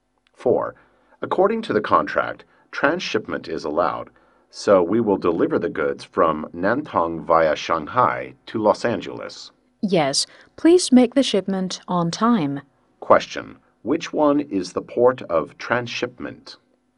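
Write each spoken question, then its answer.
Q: Which one is the port of transshipment?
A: Shanghai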